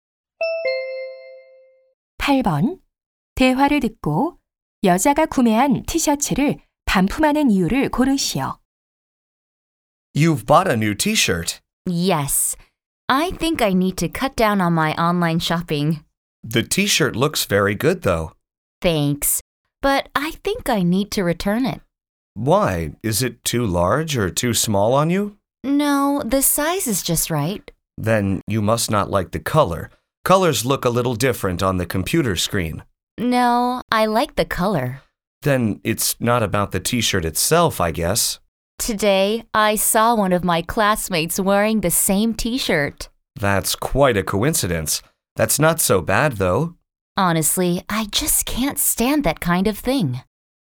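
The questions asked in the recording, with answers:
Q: 대화를 듣고 여자가 구매한 티셔츠를 반품하는 이유를 고르시오.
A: 반 친구가 똑같은 티셔츠를 입고 있어서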